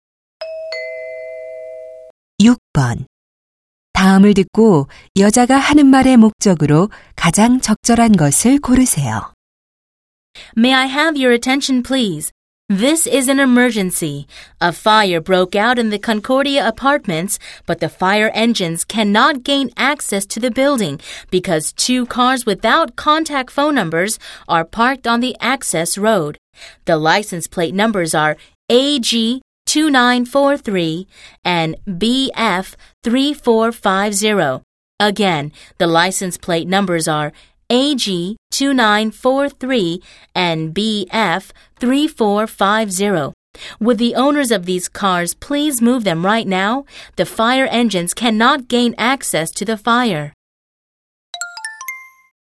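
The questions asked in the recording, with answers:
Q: 다음을 듣고 여자가 하는 말의 목적으로 가장 적절한 것을 고르세요.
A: 진입로에 주차된 차량의 이동을 요청하려고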